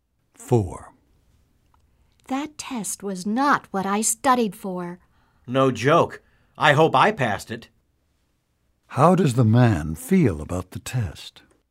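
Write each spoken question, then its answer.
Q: How does the man feel about the test?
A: He is worried he may not have passed.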